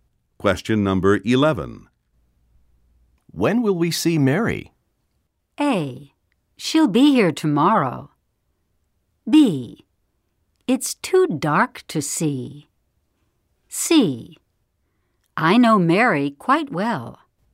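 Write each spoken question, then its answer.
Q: When will we see Mary?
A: A: She'll be here tomorrow.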